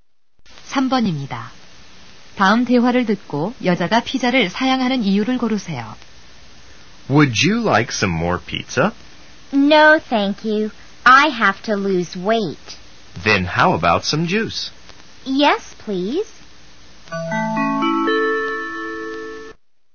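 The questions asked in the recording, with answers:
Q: 다음 대화를 듣고 여자가 피자를 사양하는 이유를 고르세요.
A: 살을 빼야 해서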